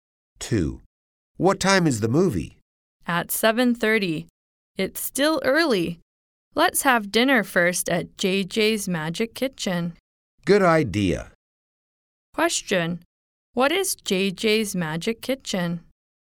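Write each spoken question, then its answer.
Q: What is JJ's Magic Kitchen?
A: A restaurant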